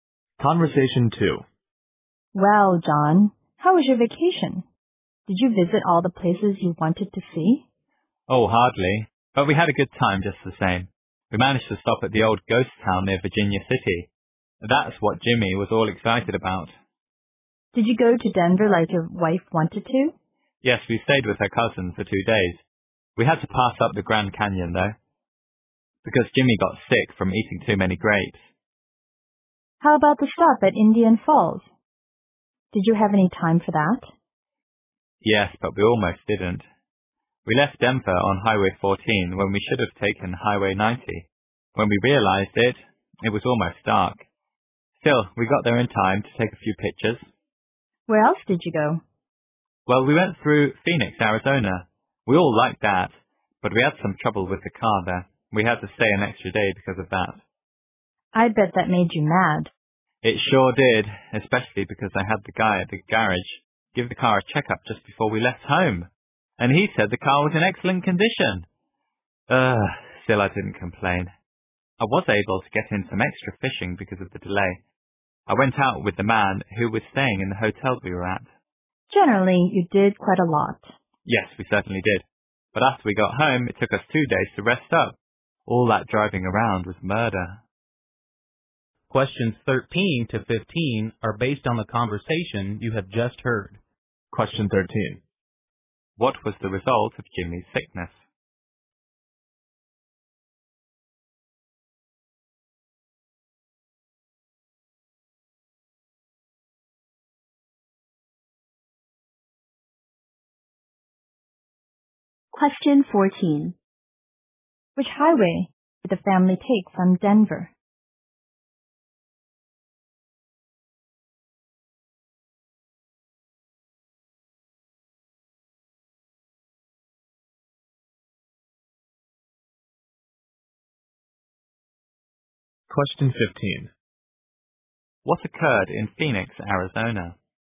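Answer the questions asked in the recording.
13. They had to skip the Grand Canyon.
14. Highway 14.
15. They had car trouble and had to stay an extra day.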